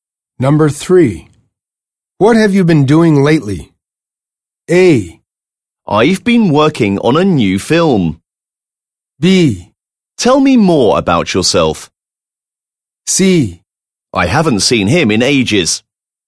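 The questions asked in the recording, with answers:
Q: What have you been doing lately?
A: A: I've been working on a new film.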